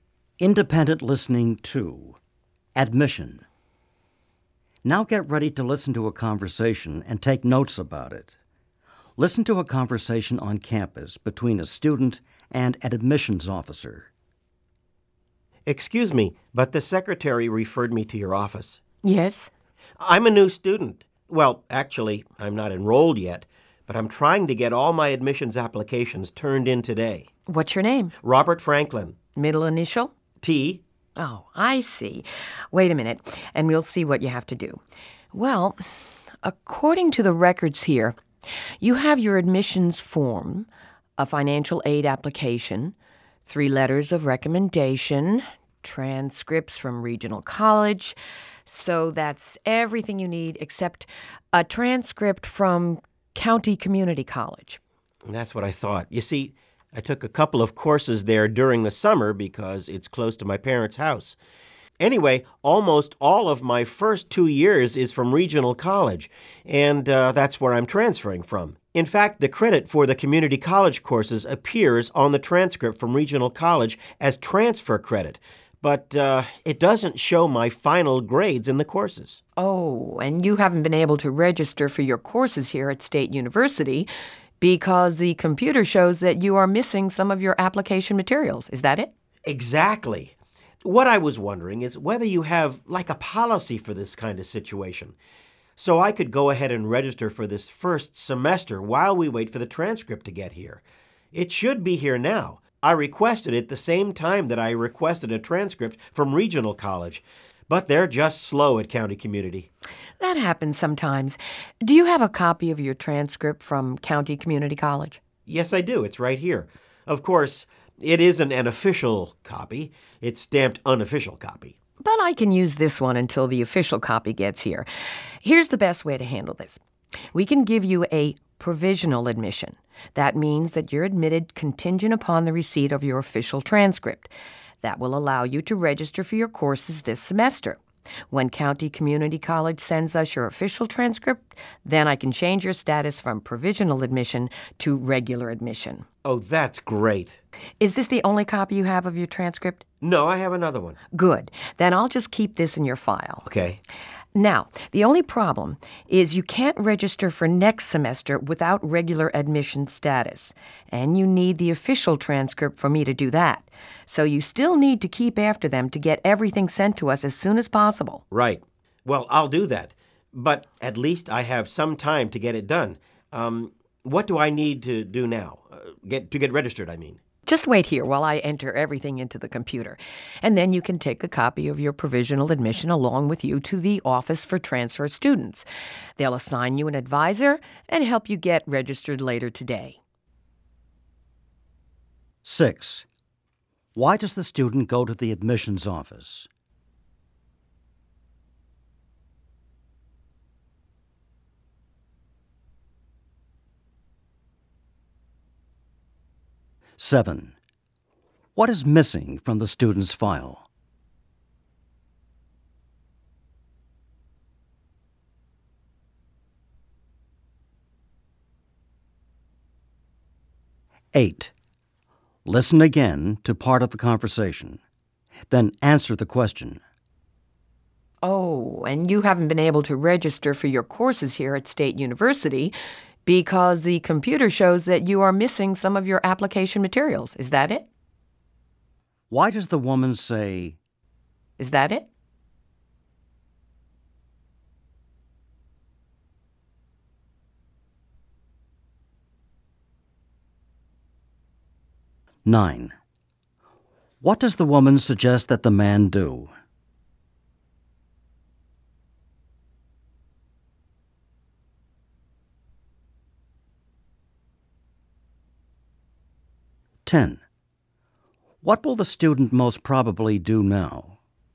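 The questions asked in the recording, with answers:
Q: Why does the student go to the admissions office?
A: To finish his application so he can register for courses

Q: What is missing from the student's file?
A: An official transcript from County Community College

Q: Why does the woman say...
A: To check that she understands his problem

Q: What will the student most probably do now?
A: Wait, then go to the Office for Transfer Students to register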